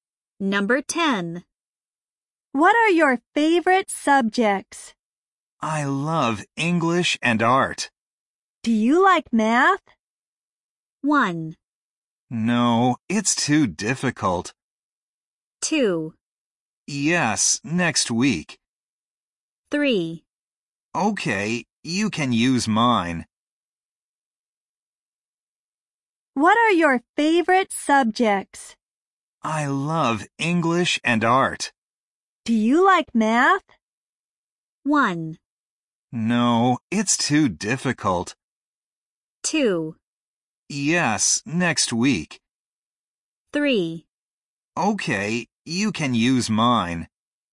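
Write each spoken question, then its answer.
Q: Do you like math?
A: 1: No, it's too difficult.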